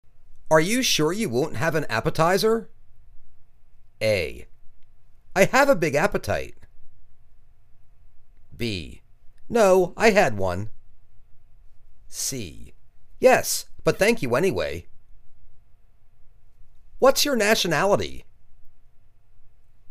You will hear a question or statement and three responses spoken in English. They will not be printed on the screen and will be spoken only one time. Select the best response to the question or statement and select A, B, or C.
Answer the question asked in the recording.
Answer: Yes, but thank you anyway.